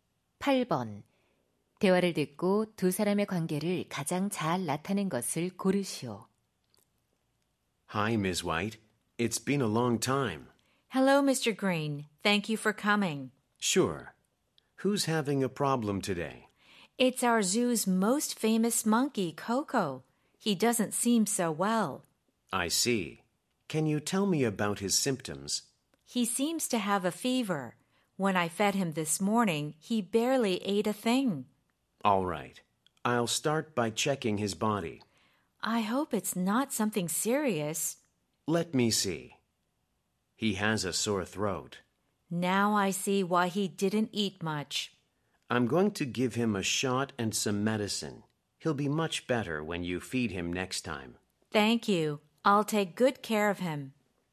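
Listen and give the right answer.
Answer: 동물원 사육사 - 수의사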